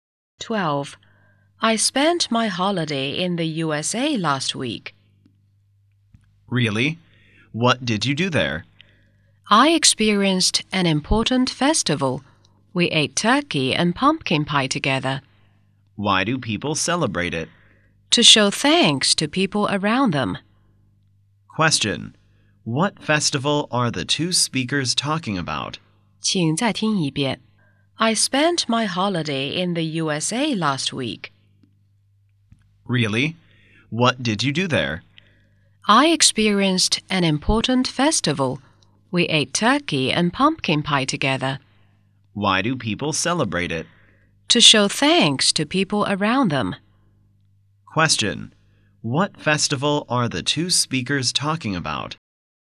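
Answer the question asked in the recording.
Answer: Thanksgiving Day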